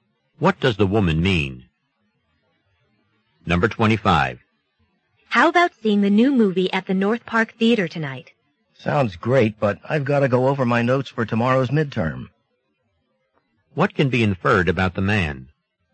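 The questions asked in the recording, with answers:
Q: What can be inferred about the man?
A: He has a midterm exam tomorrow and must study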